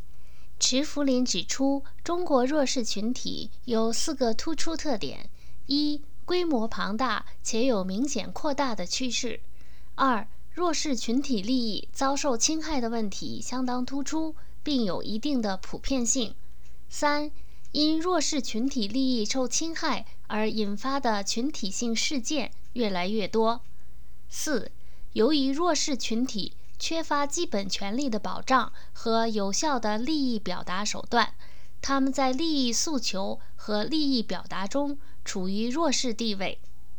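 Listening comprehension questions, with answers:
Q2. 请列出中国弱势群体的两个特点。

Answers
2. 规模庞大且有明显扩大的趋势;利益遭受侵害的问题相当突出

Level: 3rd Year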